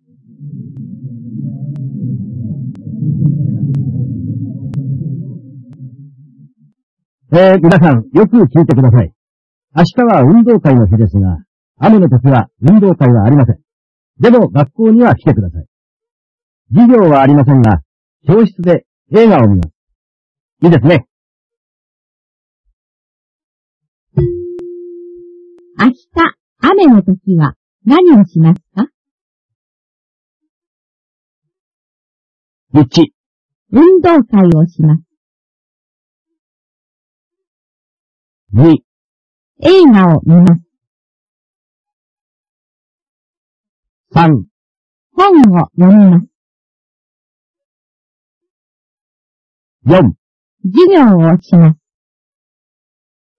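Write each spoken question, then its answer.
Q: 明日、雨の時は何をしますか?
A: 2: 映画を見ます。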